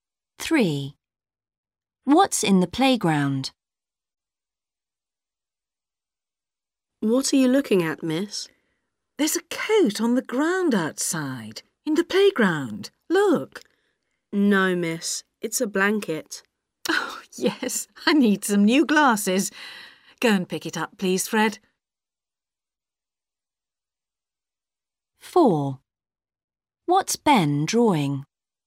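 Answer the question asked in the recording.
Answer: a blanket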